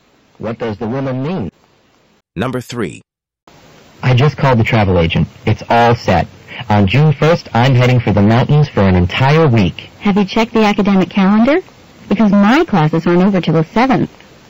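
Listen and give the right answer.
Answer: The man may need to change his travel plans because classes aren't over until the 7th.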